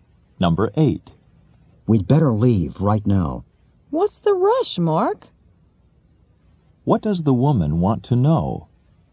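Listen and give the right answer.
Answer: Why they have to leave in such a hurry.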